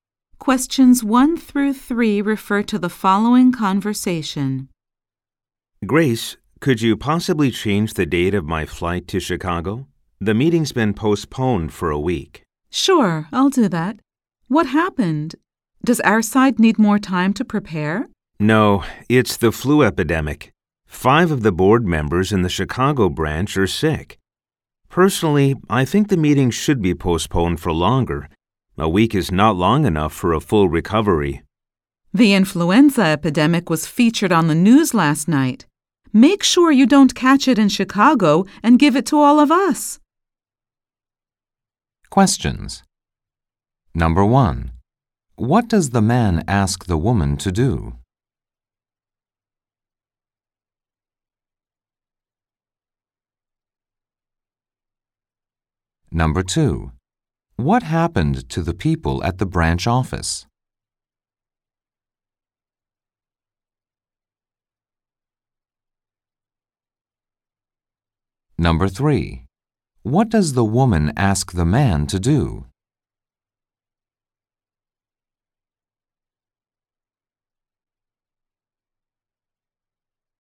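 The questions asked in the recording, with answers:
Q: What does the man ask the woman to do?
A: Change the date of his flight to Chicago

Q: What happened to the people at the branch office?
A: Five board members got sick with the flu

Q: What does the woman ask the man to do?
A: Make sure he doesn't catch the flu in Chicago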